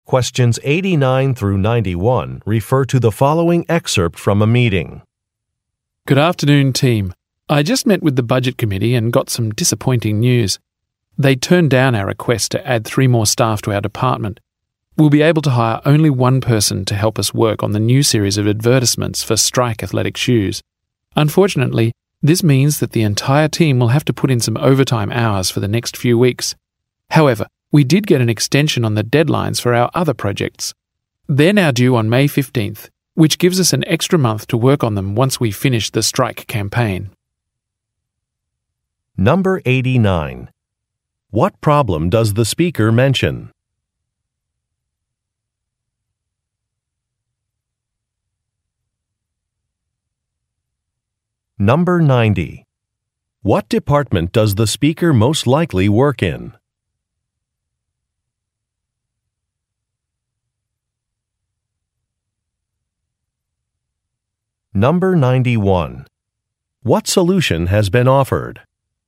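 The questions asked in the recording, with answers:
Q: What problem does the speaker mention?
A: Their request to add 3 more staff was turned down

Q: What department does the speaker most likely work in?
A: Advertising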